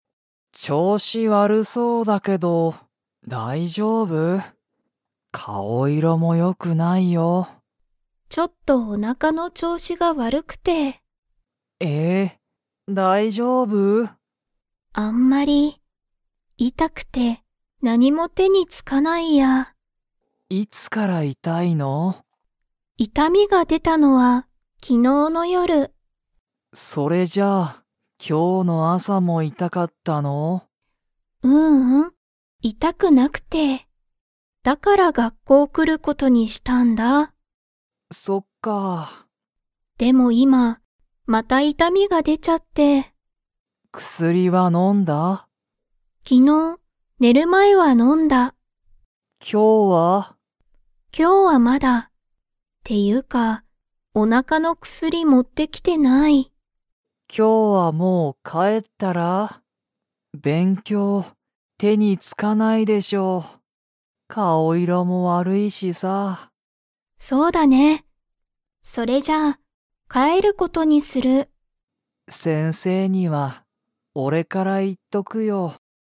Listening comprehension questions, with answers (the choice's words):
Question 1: リカのおなかの痛いたみは、いつ出でましたか?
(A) 昨日きのうの朝あさ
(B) 昨日きのうの夜よる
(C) 今日きょうの朝あさ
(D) 今日きょうの夜よる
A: 昨日きのうの夜よる

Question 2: リカは、今日きょう薬くすりを 。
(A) もう飲のんだ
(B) まだ飲のんでない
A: まだ飲のんでない

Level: Level 4